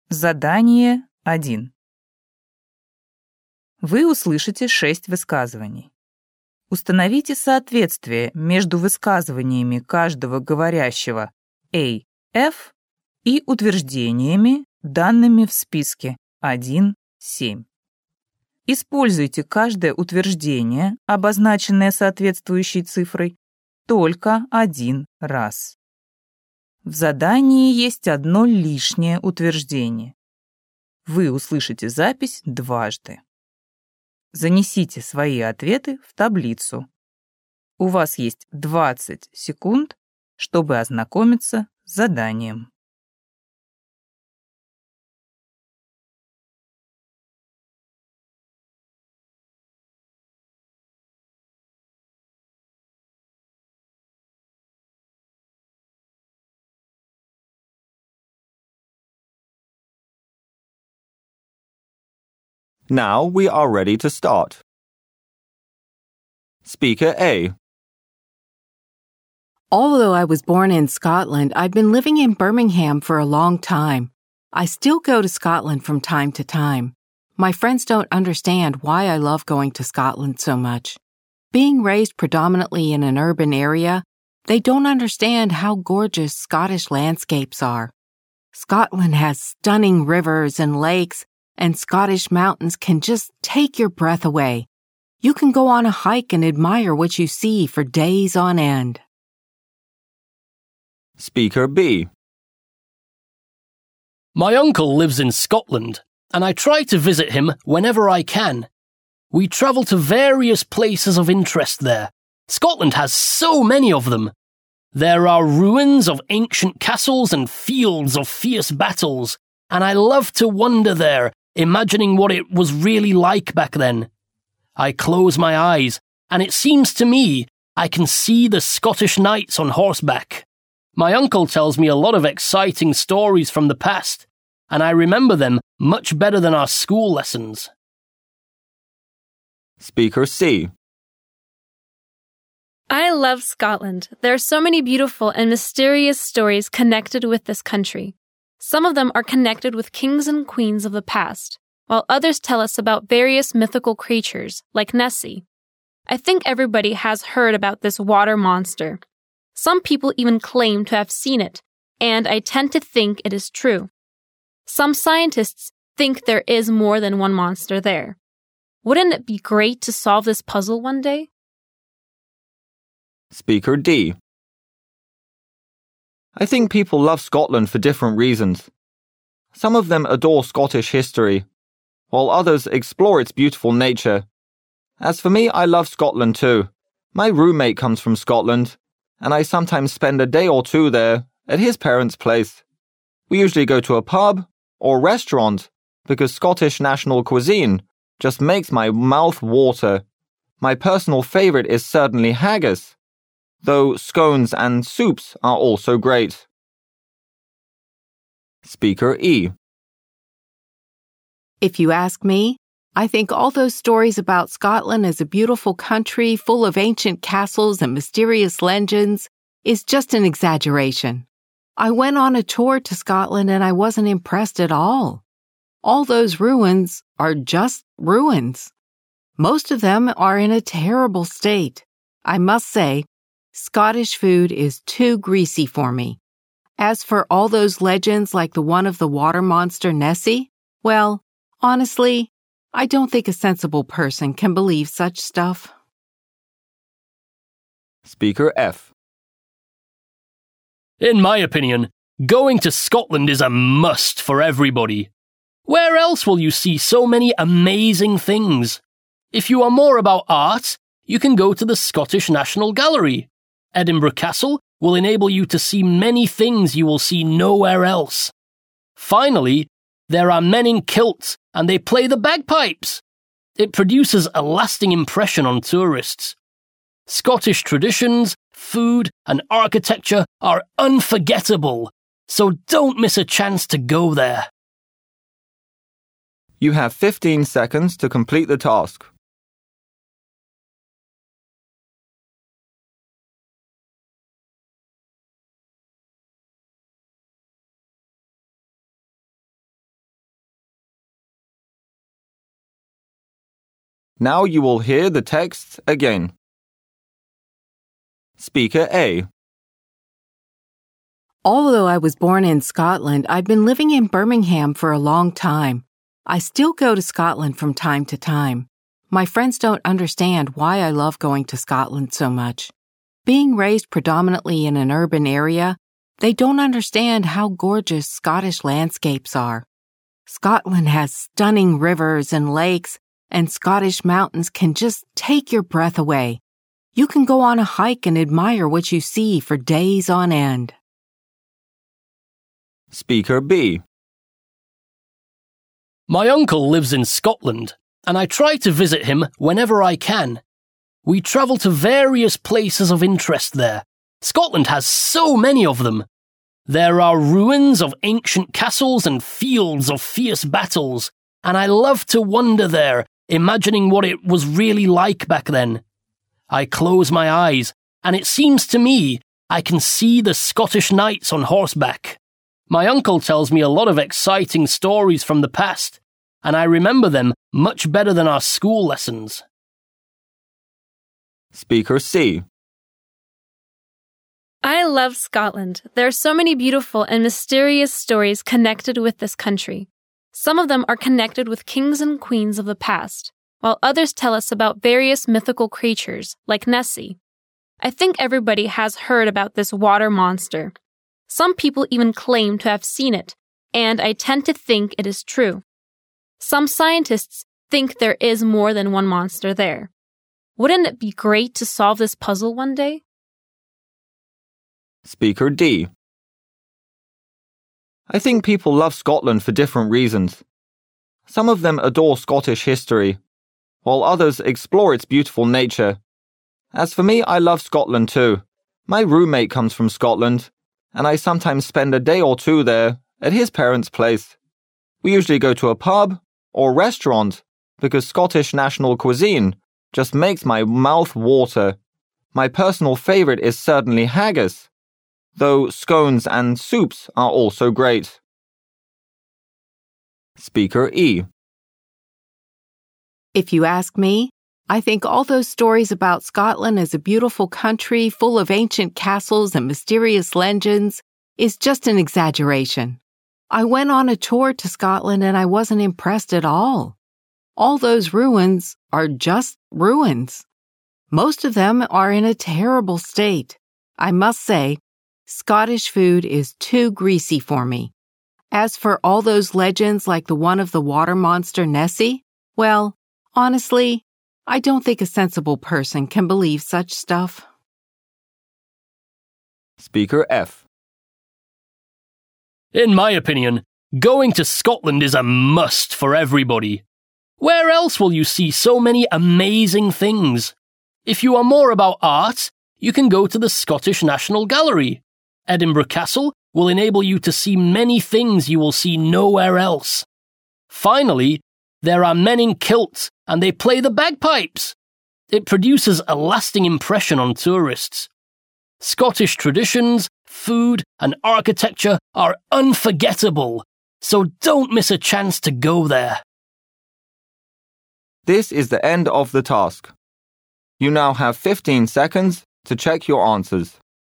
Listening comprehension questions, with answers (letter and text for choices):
Установите соответствие между высказываниями каждого говорящего A-F и утверждениями, данными в списке 1-7. Используйте каждое утверждение, обозначенное соответствующей цифрой, только один раз.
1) Scotland is a land full of legends.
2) There are no reasons to go to Scotland.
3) Scotland attracts visitors with its culture.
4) One can love Scotland for its beautiful nature.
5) Kilts are the best souvenirs from Scotland.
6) Scotland is a great place to learn history.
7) Scotland offers its visitors delicious food.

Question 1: Speaker A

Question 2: Speaker B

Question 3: Speaker C.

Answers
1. 4) One can love Scotland for its beautiful nature.
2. 6) Scotland is a great place to learn history.
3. 1) Scotland is a land full of legends.

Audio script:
Although I was born in Scotland, I've been living in Birmingham for a long time. I still go to Scotland from time to time. My friends don't understand why I love going to Scotland so much. Being raised predominantly in an urban area, they don't understand how gorgeous Scottish landscapes are. Scotland has stunning rivers and lakes, and Scottish mountains can just take your breath away. You can go on a hike and admire what you see for days on end.
My uncle lives in Scotland and I try to visit him whenever I can. We travel to various places of interest there. Scotland has so many of them. There are ruins of ancient castles and fields of fierce battles. And I love to wonder there, imagining what it was really like back then. I close my eyes and it seems to me I can see the Scottish nights on horseback. My uncle tells me a lot of exciting stories from the past. And I remember them much better than our school lessons.
I love Scotland. There are so many beautiful and mysterious stories connected with this country. Some of them are connected with kings and queens of the past, while others tell us about various mythical creatures, like Nessie. I think everybody has heard about this water monster. Some people even claim to have seen it and I tend to think it is true. Some scientists think there is more than one monster there. Wouldn't it be great to see it?
Speaker D.
I think people love Scotland for different reasons. Some of them adore Scottish history, while others explore its beautiful nature. As for me, I love Scotland too. My roommate comes from Scotland, and I sometimes spend a day or two there at his parents' place. We usually go to a pub or restaurant, because Scottish National Cuisine just makes my mouth water. My personal favourite is certainly Haggis, though scones and soups are also great.
Speaker E
If you ask me, I think all those stories about Scotland as a beautiful country full of ancient castles and mysterious legends is just an exaggeration. I went on a tour to Scotland and I wasn't impressed at all. All those ruins are just ruins. Most of them are in a terrible state. I must say, Scottish food is too greasy for me. As for all those legends like the one of the water monster Nessie, well, honestly, I don't think a sensible person can believe such stuff. I don't think anyone can believe it. I don't think anyone can believe it. I don't think a sensible person can believe such stuff.
Speaker F
In my opinion, going to Scotland is a must for everybody. Where else will you see so many amazing things? If you are more about art, you can go to the Scottish National Gallery. Edinburgh Castle will enable you to see many things you will see nowhere else. Finally, there are many kilts and they play the bagpipes. It produces a lasting impression on tourists. Scottish traditions, food and architecture are unforgettable. So don't miss a chance to go there.